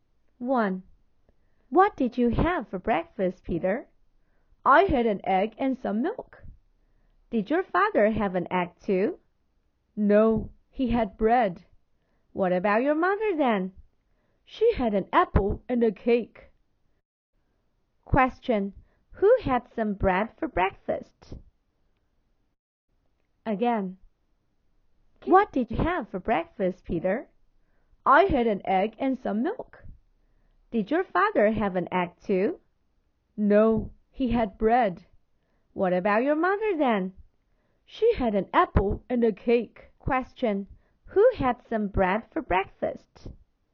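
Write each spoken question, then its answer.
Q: Who had some bread for breakfast?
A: Peter's father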